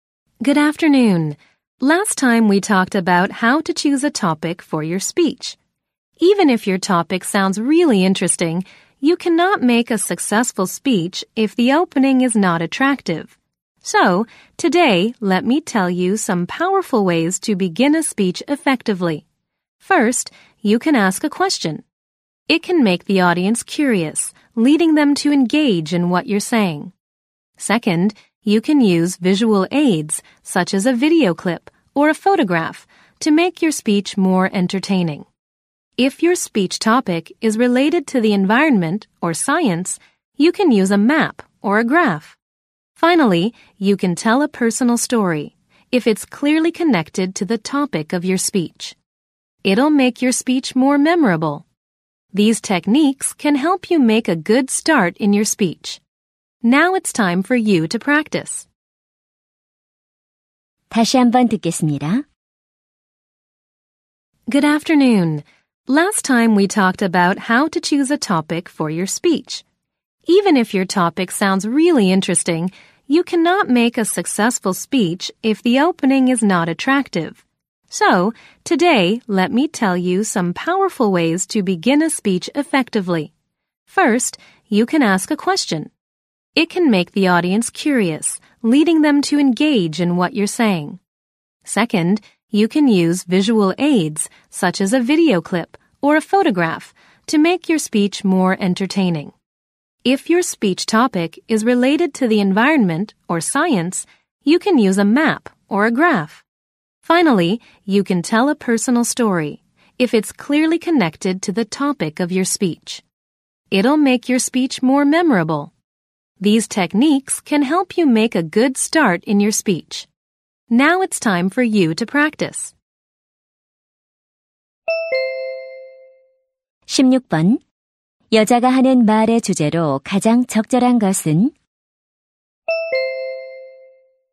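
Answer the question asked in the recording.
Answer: 연설을 효과적으로 시작하는 방법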